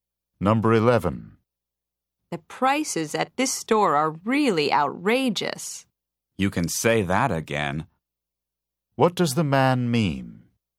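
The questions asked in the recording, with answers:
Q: What does the man mean?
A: He agrees that the prices are very high.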